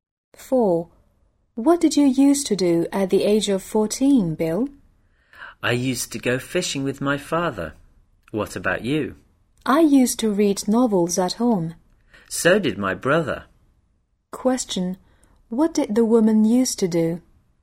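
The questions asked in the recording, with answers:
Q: What did the woman used to do?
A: Read novels at home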